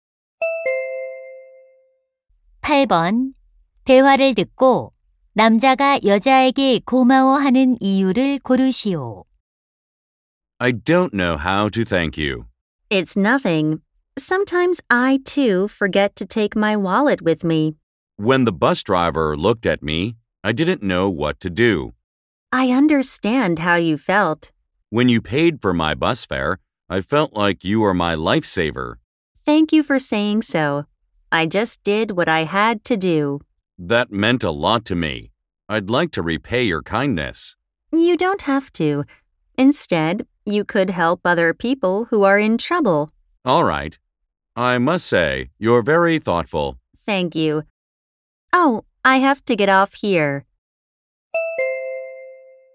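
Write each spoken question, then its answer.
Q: 대화를 듣고 남자가 여자에게 고마워하는 이유를 고르시오.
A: 버스 요금을 대신 내 주어서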